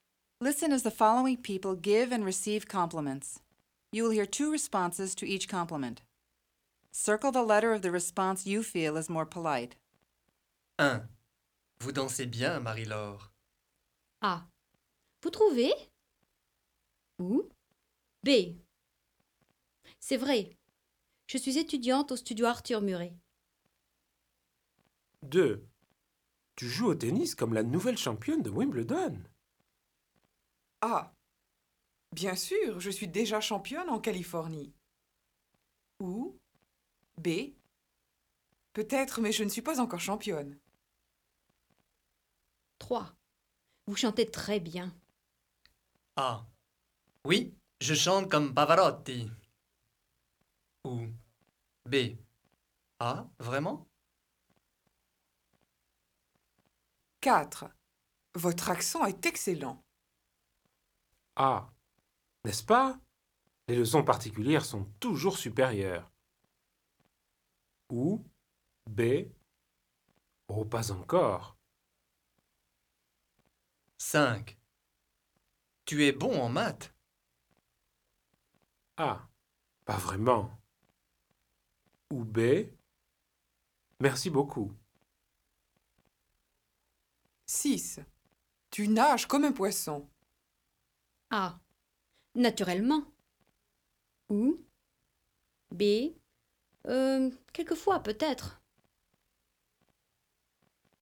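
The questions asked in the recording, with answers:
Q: Tu joues au tennis comme la nouvelle championne de Wimbledon.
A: B: Peut-être, mais je ne suis pas encore championne.

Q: Vous chantez très bien.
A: B: Ah, vraiment?

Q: Votre accent est excellent.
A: B: Oh, pas encore.

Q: Tu nages comme un poisson.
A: B: Quelquefois, peut-être.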